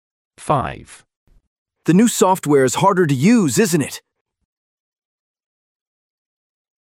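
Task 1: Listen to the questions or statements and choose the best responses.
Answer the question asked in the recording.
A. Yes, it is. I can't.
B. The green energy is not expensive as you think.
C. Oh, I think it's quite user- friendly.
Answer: C. Oh, I think it's quite user- friendly.

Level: A2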